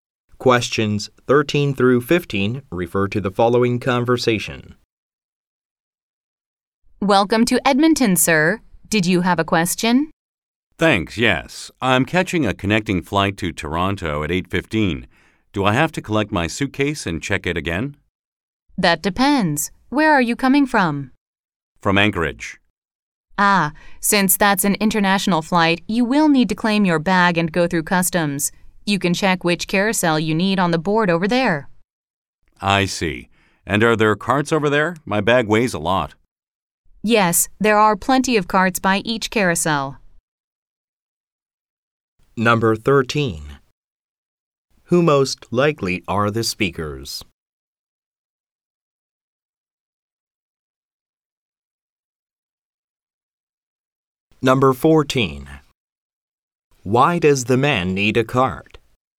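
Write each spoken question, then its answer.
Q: Who most likely are the speakers?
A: An airport employee and a traveler.

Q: Why does the man need a cart?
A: His bag is heavy.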